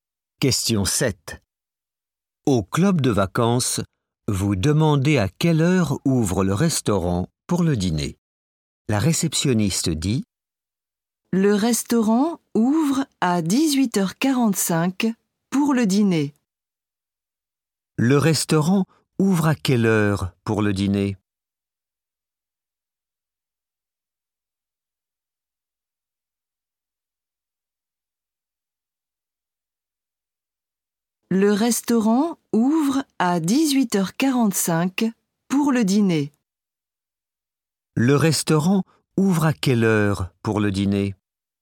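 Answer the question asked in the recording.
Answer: 18h45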